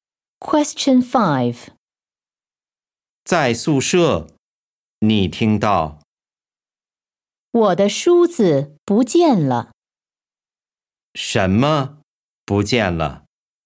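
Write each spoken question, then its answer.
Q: 什么不见了?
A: 梳子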